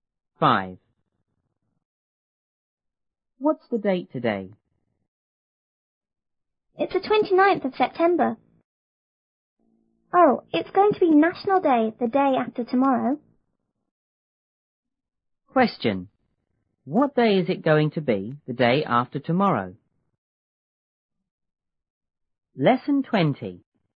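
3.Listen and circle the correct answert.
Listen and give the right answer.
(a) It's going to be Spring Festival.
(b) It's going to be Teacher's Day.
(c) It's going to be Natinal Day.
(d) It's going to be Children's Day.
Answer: (c) It's going to be Natinal Day.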